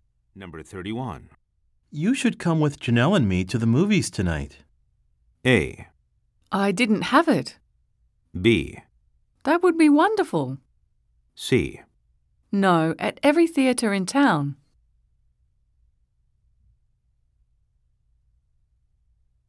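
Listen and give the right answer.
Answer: B: That would be wonderful.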